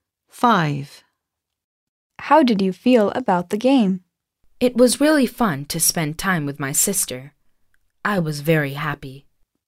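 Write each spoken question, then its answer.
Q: How did you feel about the game?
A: Very happy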